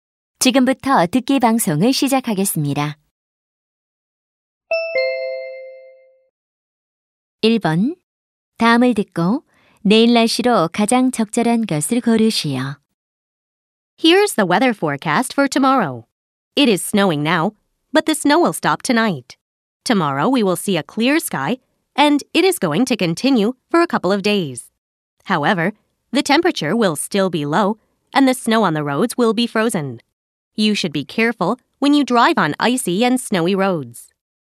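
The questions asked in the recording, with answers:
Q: 다음을 듣고 내일 날씨로 가장 적절한 것을 고르시오.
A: 맑음 (추움)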